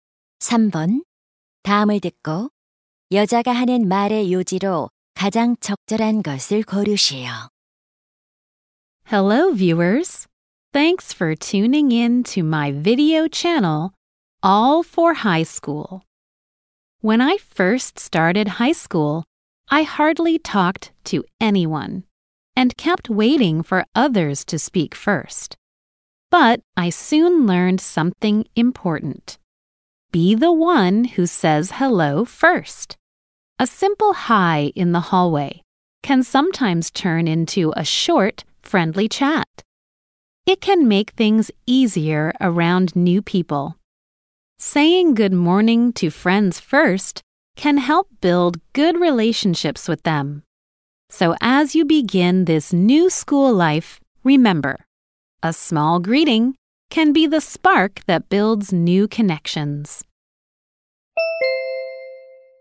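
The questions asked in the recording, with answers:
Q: 다음을 듣고 여자가 하는 말의 요지로 가장 적절한 것을 고르시오.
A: 먼저 인사하는 것이 새로운 관계를 만드는 데 도움이 된다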